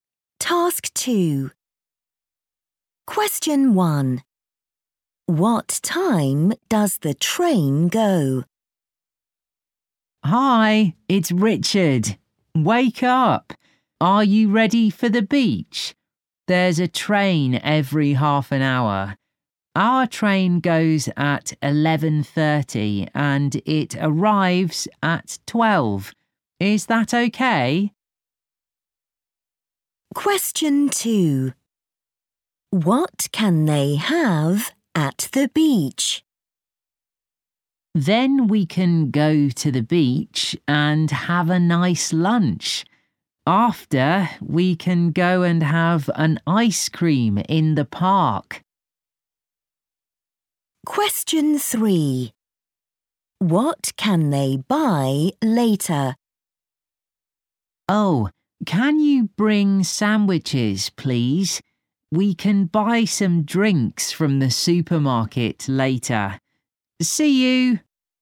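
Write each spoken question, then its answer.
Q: What time does the train go?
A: 11:30

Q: What can they have at the beach?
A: a nice lunch

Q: What can they buy later?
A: some drinks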